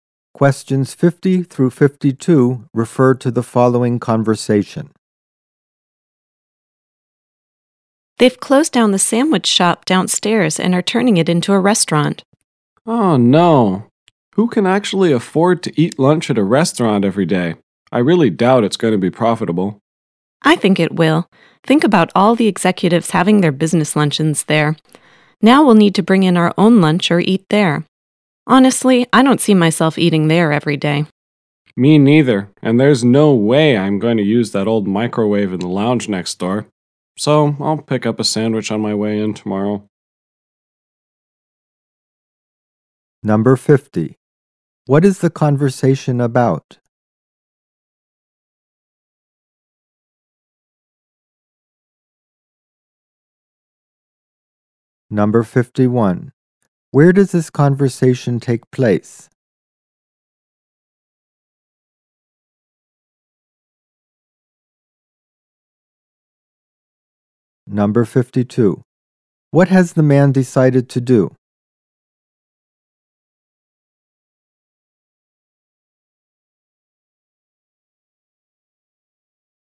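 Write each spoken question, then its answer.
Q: What is the conversation about?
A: The sandwich shop downstairs being turned into a restaurant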